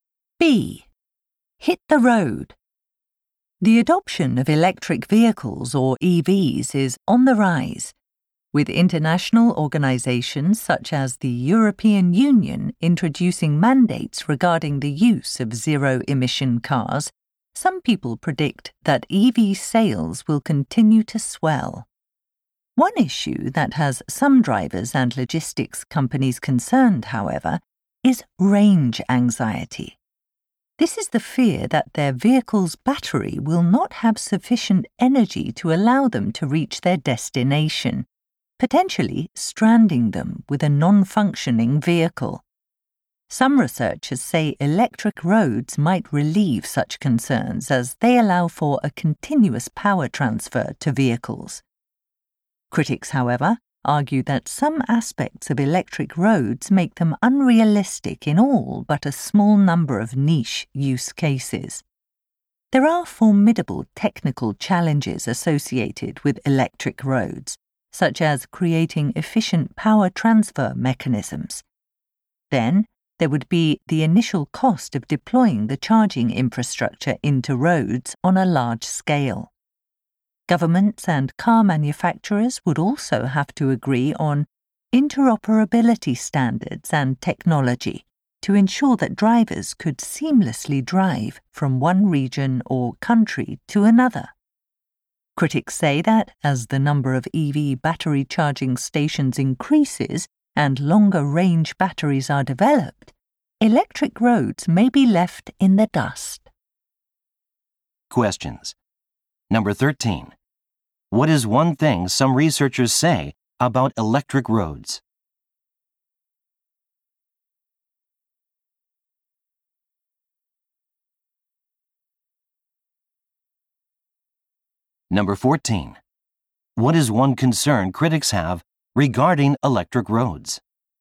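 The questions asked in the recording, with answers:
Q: What is one thing some researchers say about electric roads?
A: They might relieve range anxiety by allowing continuous power transfer to vehicles.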